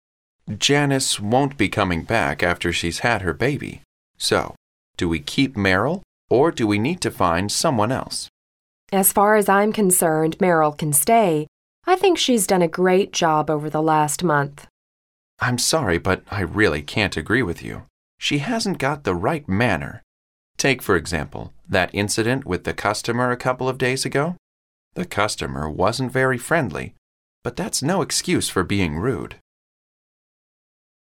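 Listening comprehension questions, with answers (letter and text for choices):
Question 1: According to the man, who is going to take over the position they are talking about?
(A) Janice.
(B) Someone else.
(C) Meryl.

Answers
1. (B) Someone else.

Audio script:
M: Janice won't be coming back after she's had her baby, so do we keep Meryl, or do we need to find someone else?
W: As far as I'm concerned, Meryl can stay. I think she's done a great job over the last month.
M: I'm sorry, but I really can't agree with you. She hasn't got the right manner. Take for example that incident with the customer a couple of days ago. The customer wasn't very friendly, but that's no excuse for being rude.

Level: C类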